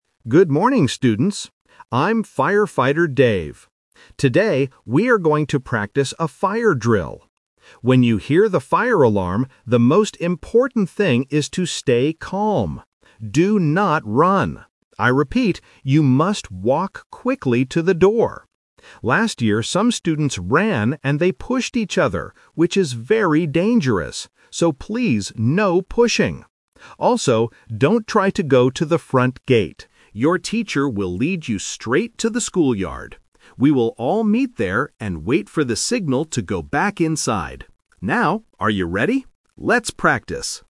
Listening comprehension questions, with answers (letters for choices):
Listen to a firefighter talking about the fire drill at school. Select the best option (A, B, or C) for each of the following questions.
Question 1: What should the students do when they move to the door?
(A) Run as fast as they can.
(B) Walk quickly.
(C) Hold hands with a friend.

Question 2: What did some students do wrong during the drill last year?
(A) They pushed each other.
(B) They went to the front gate.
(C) They stayed in the classroom.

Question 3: Where is the meeting place for the fire drill today?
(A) Inside the classroom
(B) At the front gate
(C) In the school yard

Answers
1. B
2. A
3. C

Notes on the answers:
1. Firefighter Dave clearly instructs the students: "...you must walk quickly to the door." Why the traps are wrong: Option (A) is "The Rejected Option". He explicitly warns them, "Do not run." Option (C) is a plausible safety action for young children, but it is not mentioned in the audio.
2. He explains the mistake from the past: "Last year, some students ran and they pushed each other..." Why the traps are wrong: Option (B) is a "Detail Trap". The front gate is mentioned later in the audio, but it is not what students did wrong last year. Option (C) is a plausible wrong action during a fire, but it is not mentioned.
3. He tells the students, "Your teacher will lead you straight to the school yard. We will all meet there..." Why the traps are wrong: Option (B) is "The Twist Trap". The front gate is a plausible meeting place, but he specifically says, "...don't try to go to the front gate." Option (A) is wrong because they need to go back inside after the drill, not meet there.

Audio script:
Firefighter Dave: Good morning, students. I'm Firefighter Dave. Today, we are going to practice a fire drill. When you hear the fire alarm, the most important thing is to stay calm. Do not run. I repeat, you must walk quickly to the door. Last year, some students ran and they pushed each other, which is very dangerous. So please, no pushing. Also, don't try to go to the front gate. Your teacher will lead you straight to the school yard. We will all meet there and wait for the signal to go back inside. Now, are you ready? Let's practice!